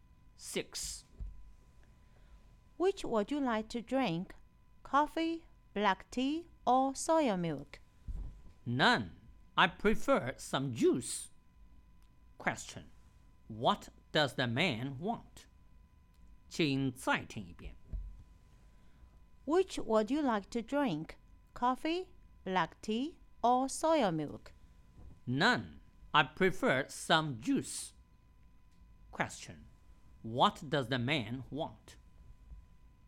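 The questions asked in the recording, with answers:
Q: What does the man want?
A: Some juice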